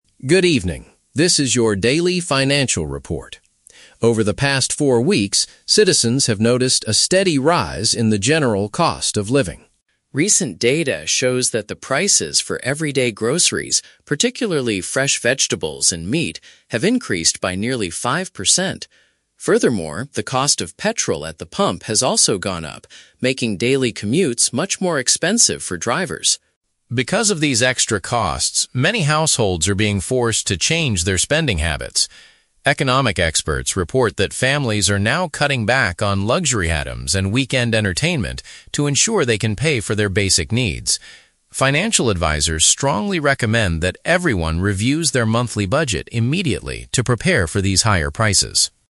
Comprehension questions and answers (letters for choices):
Listen to a short economic news report. For each question, choose the correct answer (A, B, or C).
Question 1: What is the main subject of this news report?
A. A sudden drop in the price of public transportation.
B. The recent increase in everyday living expenses.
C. A new government program to help poor families.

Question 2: According to the report, which two specific things have become more expensive?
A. Cinema tickets and restaurant meals.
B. Apartment rent and household electricity.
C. Fresh food and fuel for vehicles.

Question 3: How are families reacting to this economic situation?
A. They are asking their companies for a higher salary.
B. They are reducing their spending on non-essential, fun activities.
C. They are selling their personal cars to save gas money.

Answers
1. B
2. C
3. B

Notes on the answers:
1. The reporter states there is a "steady rise in the general cost of living" (recent increase in everyday living expenses). Option (A) is a trap; "commutes" are mentioned, but they are becoming more expensive, not dropping in price. Option (C) is never mentioned in the audio.
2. The script mentions that "everyday groceries, particularly fresh vegetables and meat" (fresh food) and "petrol" (fuel for vehicles) have increased in price. Option (A) is a trap; these are examples of "weekend entertainment" which people are cutting back on, not the things that increased in price. Option (B) is a trap; housing and electricity are common living costs but are not mentioned in this specific report.
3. The reporter says families are "cutting back on luxury items and weekend entertainment" (reducing spending on non-essential, fun activities). Option (A) is a plausible real-world reaction, but it is not mentioned. Option (C) is a trap; petrol costs are higher, but the report does not say people are selling their cars.

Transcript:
Reporter: Good evening. This is your Daily Financial Report. Over the past four weeks, citizens have noticed a steady rise in the general cost of living.
Recent data shows that the prices for everyday groceries, particularly fresh vegetables and meat, have increased by nearly five percent. Furthermore, the cost of petrol at the pump has also gone up, making daily commutes much more expensive for drivers.
Because of these extra costs, many households are being forced to change their spending habits. Economic experts report that families are now cutting back on luxury items and weekend entertainment to ensure they can pay for their basic needs. Financial advisors strongly recommend that everyone reviews their monthly budget immediately to prepare for these higher prices.